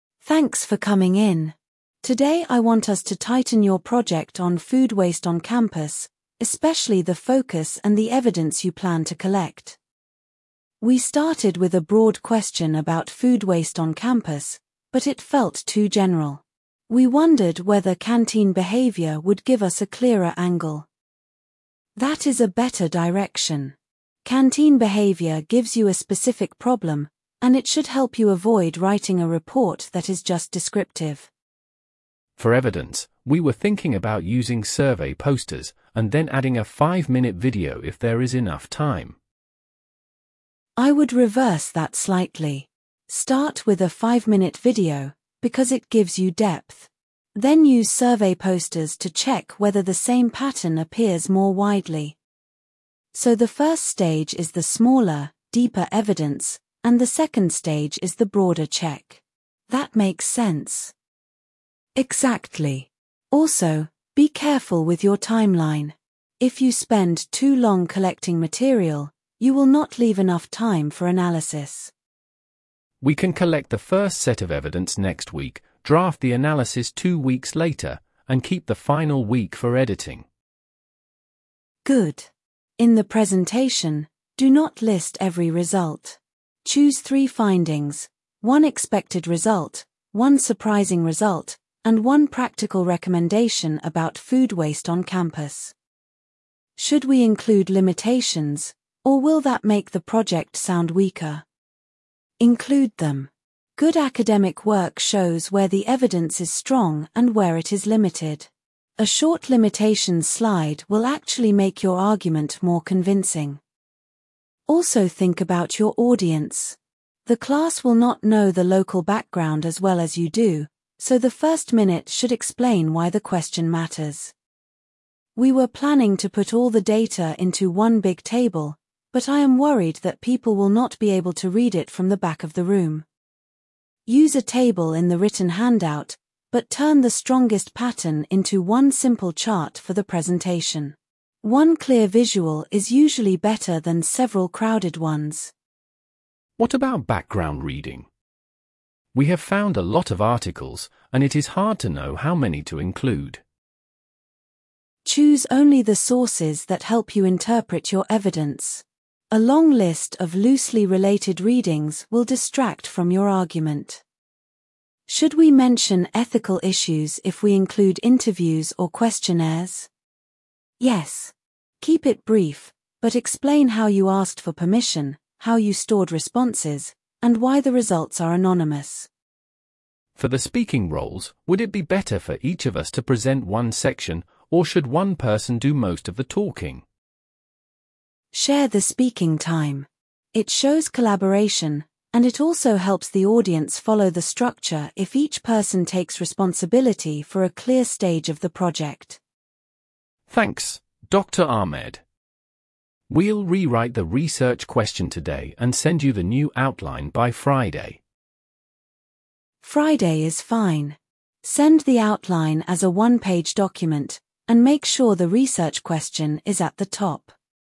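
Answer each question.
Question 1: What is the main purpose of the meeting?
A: To refine a project on food waste on campus

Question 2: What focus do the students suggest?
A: Canteen behaviour

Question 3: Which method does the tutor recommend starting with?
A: A five-minute video

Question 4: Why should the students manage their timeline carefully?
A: To leave enough time for analysis

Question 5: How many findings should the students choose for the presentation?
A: Three

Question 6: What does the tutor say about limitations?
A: Mention them briefly

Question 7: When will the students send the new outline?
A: By Friday

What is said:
Tutor: Thanks for coming in. Today I want us to tighten your project on food waste on campus, especially the focus and the evidence you plan to collect.
Student A: We started with a broad question about food waste on campus, but it felt too general. We wondered whether canteen behaviour would give us a clearer angle.
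Tutor: That is a better direction. Canteen behaviour gives you a specific problem, and it should help you avoid writing a report that is just descriptive.
Student B: For evidence, we were thinking about using survey posters, and then adding a five-minute video if there is enough time.
Tutor: I would reverse that slightly. Start with a five-minute video, because it gives you depth. Then use survey posters to check whether the same pattern appears more widely.
Student A: So the first stage is the smaller, deeper evidence, and the second stage is the broader check. That makes sense.
Tutor: Exactly. Also, be careful with your timeline. If you spend too long collecting material, you will not leave enough time for analysis.
Student B: We can collect the first set of evidence next week, draft the analysis two weeks later, and keep the final week for editing.
Tutor: Good. In the presentation, do not list every result. 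Choose three findings: one expected result, one surprising result, and one practical recommendation about food waste on campus.
Student A: Should we include limitations, or will that make the project sound weaker?
Tutor: Include them. Good academic work shows where the evidence is strong and where it is limited. A short limitations slide will actually make your argument more convincing.
Tutor: Also think about your audience. The class will not know the local background as well as you do, so the first minute should explain why the question matters.
Student A: We were planning to put all the data into one big table, but I am worried that people will not be able to read it from the back of the room.
Tutor: Use a table in the written handout, but turn the strongest pattern into one simple chart for the presentation. One clear visual is usually better than several crowded ones.
Student B: What about background reading? 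We have found a lot of articles, and it is hard to know how many to include.
Tutor: Choose only the sources that help you interpret your evidence. A long list of loosely related readings will distract from your argument.
Student A: Should we mention ethical issues if we include interviews or questionnaires?
Tutor: Yes. Keep it brief, but explain how you asked for permission, how you stored responses, and why the results are anonymous.
Student B: For the speaking roles, would it be better for each of us to present one section, or should one person do most of the talking?
Tutor: Share the speaking time. It shows collaboration, and it also helps the audience follow the structure if each person takes responsibility for a clear stage of the project.
Student B: Thanks, Dr Ahmed. We'll rewrite the research question today and send you the new outline by Friday.
Tutor: Friday is fine. Send the outline as a one-page document, and make sure the research question is at the top.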